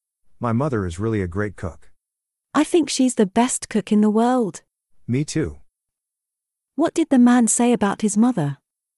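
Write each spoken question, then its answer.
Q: What did the man say about his mother?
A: She is a great cook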